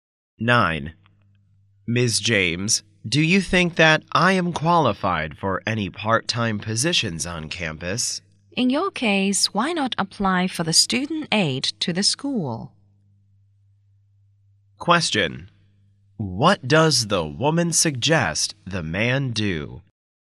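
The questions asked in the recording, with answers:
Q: What does the woman suggest the man do?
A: Apply for student aid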